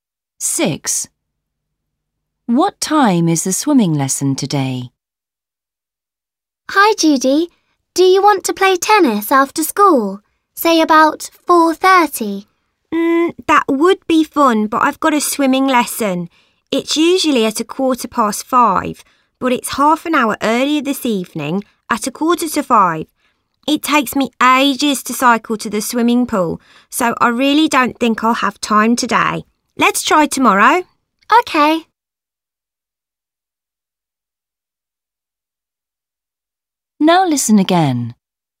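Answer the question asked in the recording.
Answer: 4:45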